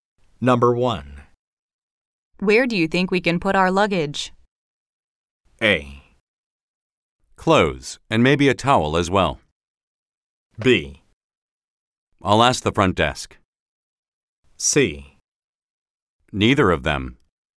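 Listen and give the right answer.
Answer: B: I'll ask the front desk.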